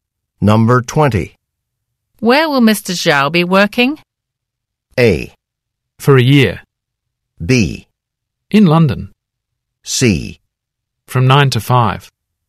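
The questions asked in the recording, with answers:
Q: Where will Mr. Zhao be working?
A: B: In London.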